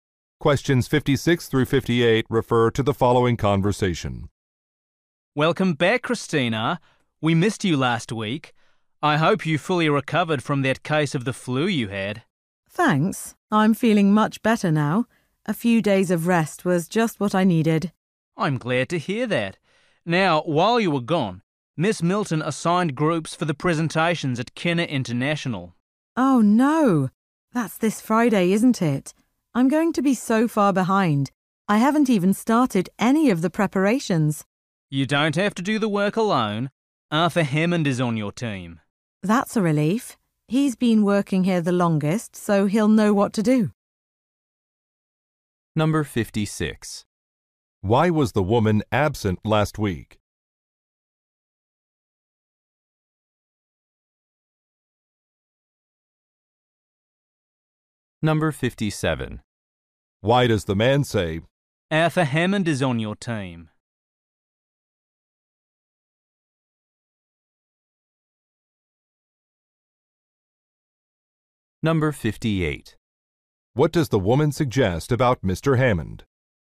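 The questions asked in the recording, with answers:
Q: Why was the woman absent last week?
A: She had the flu

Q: "Arthur Hammond is on your team"?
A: To reassure her that she won't have to do the work alone

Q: What does the woman suggest about Mr.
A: He is experienced; he has worked there the longest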